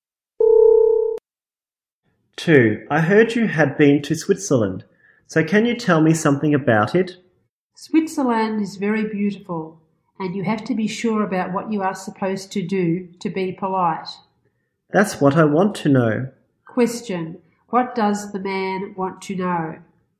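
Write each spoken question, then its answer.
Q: What does the man want to know?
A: How to be polite in Switzerland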